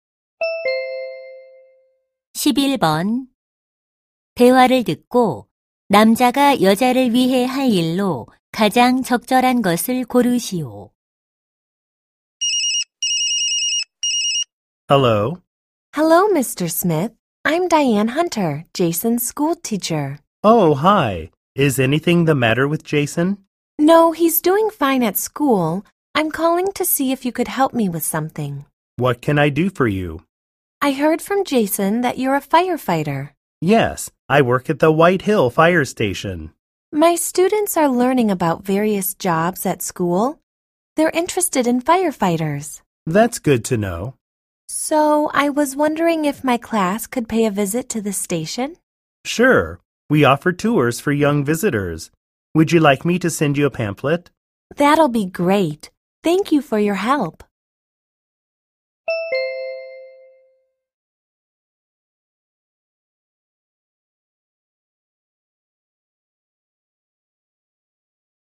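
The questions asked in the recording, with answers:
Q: 대화를 듣고 남자가 여자를 위해 할 일로 가장 적절한 것을 고르시오.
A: 소방서 견학 안내 팸플릿 보내기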